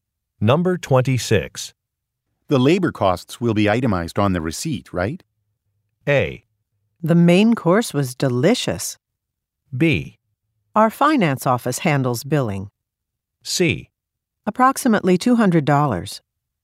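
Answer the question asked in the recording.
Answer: B: Our finance office handles billing.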